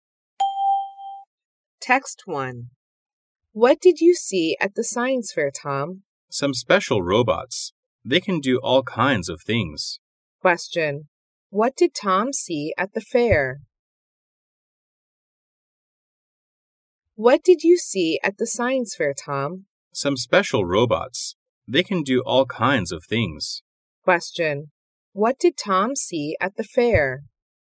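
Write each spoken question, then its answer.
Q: What did Tom see at the fair?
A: Some special robots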